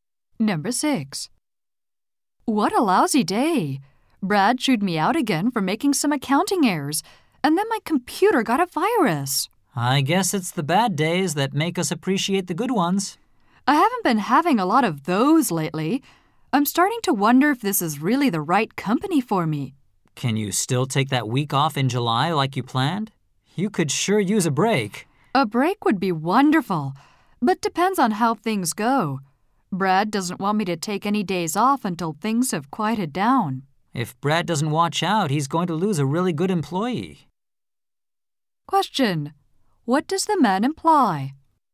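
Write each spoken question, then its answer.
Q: What does the man imply?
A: Brad's treatment may make the woman quit.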